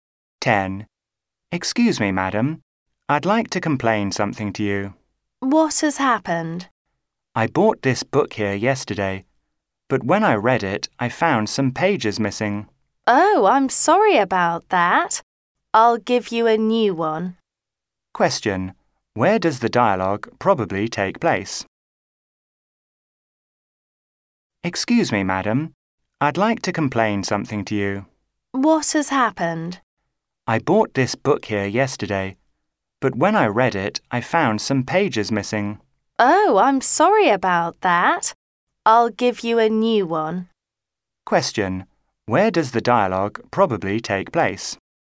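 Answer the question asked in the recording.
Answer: In a bookshop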